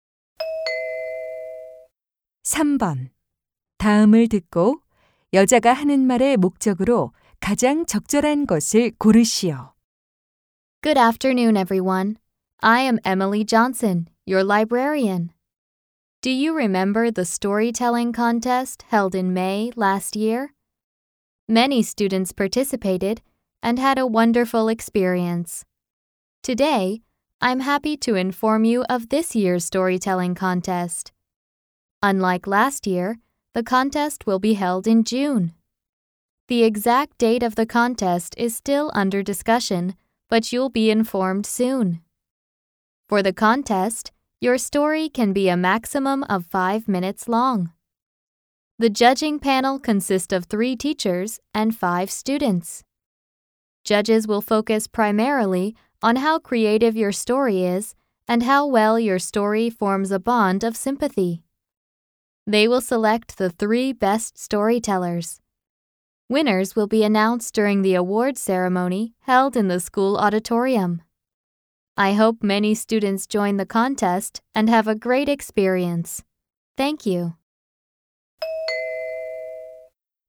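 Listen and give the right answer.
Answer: 올해 이야기 대회를 안내하려고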